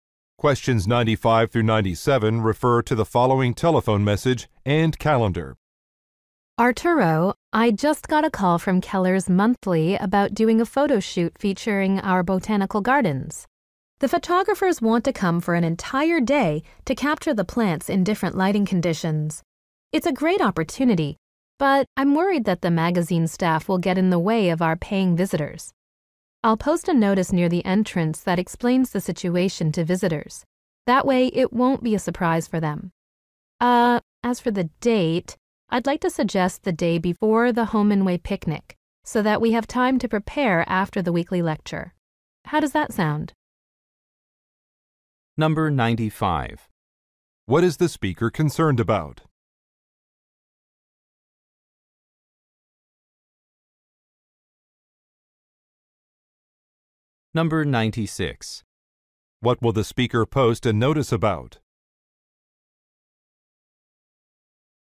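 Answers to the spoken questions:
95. Magazine staff getting in the way of visitors
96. The photo shoot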